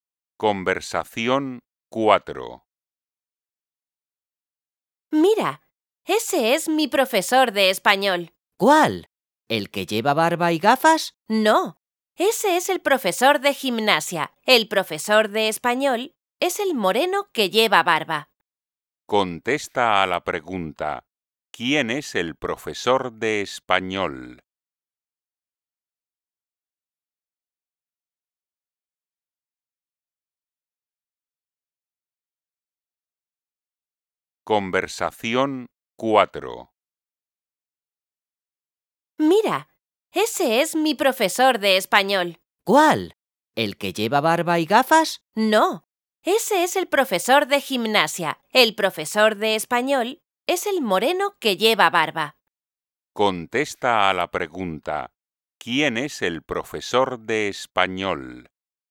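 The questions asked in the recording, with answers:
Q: ¿quién es el profesor de español?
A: el moreno que lleva barba (sin gafas)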